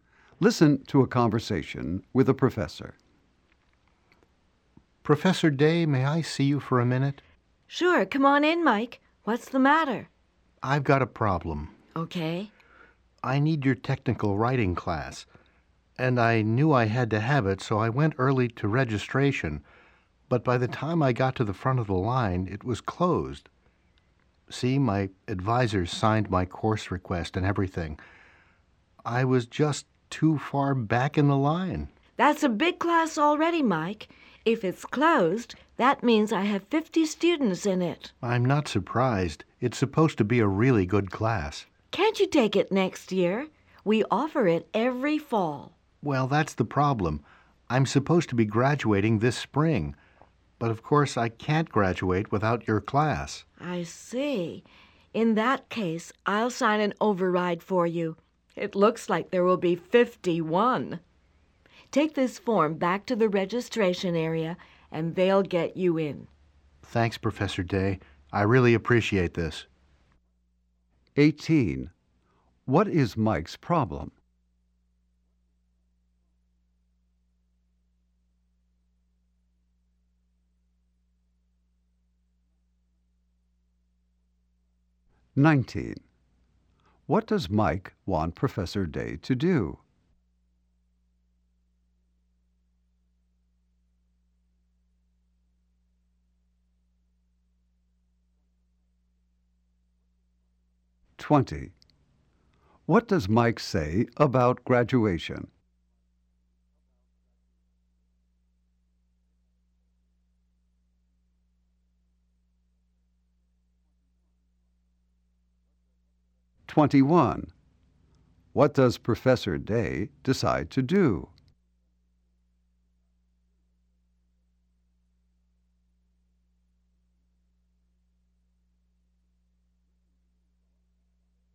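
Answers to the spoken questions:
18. The technical writing class he needs was closed when he registered.
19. Let him into the closed class (sign an override).
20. He is supposed to graduate this spring and can't without the class.
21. Sign an override to let him into the class.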